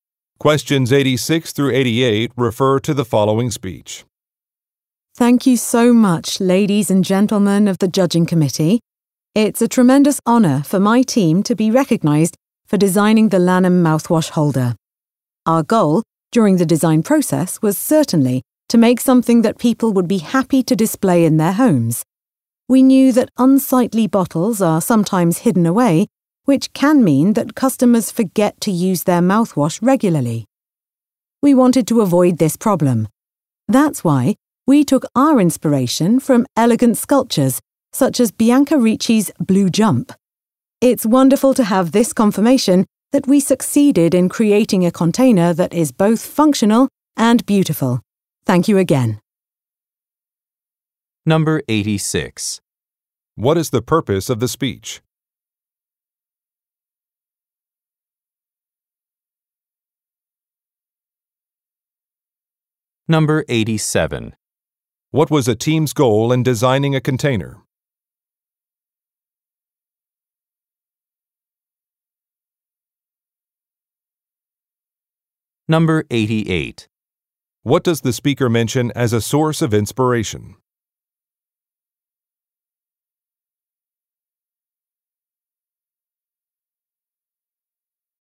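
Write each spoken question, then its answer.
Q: What is the purpose of the speech?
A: To accept an award for a product design

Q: What was a team's goal in designing a container?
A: To make something people would be happy to display in their homes

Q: What does the speaker mention as a source of inspiration?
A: Elegant sculptures, such as Bianca Ricci's Blue Jump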